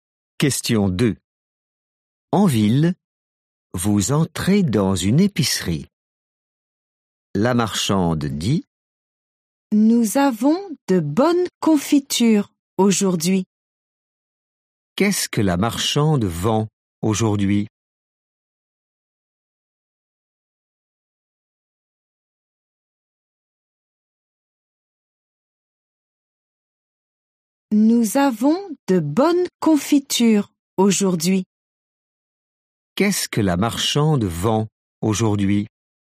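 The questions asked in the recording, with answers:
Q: Qu'est-ce que la marchande vend aujourd'hui ?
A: de la confiture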